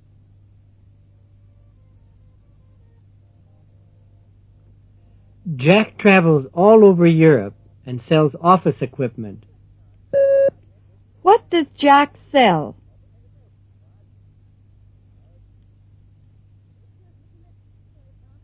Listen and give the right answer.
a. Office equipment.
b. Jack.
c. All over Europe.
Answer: a. Office equipment.

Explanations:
Jack travels all over Europe and sells office equipment. What does Jack sell?

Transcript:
l0.Jack travels all over Europe and sells office equipment. What does Jack sell?